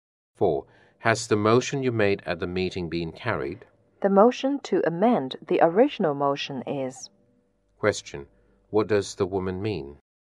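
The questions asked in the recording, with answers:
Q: What does the woman mean?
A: Only the motion to amend the original motion has been carried.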